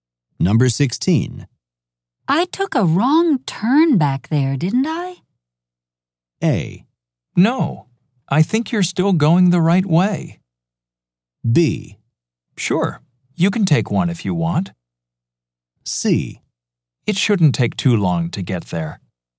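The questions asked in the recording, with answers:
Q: I took a wrong turn back there, didn't I?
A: A: No, I think you're still going the right way.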